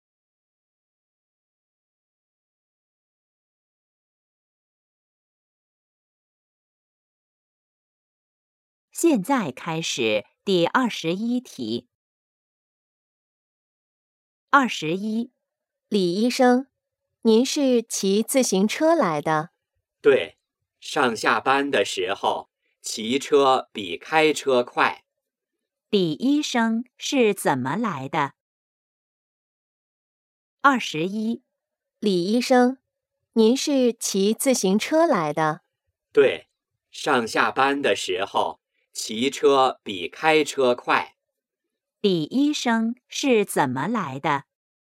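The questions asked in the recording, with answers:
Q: 李医生是怎么来的?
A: 骑自行车来的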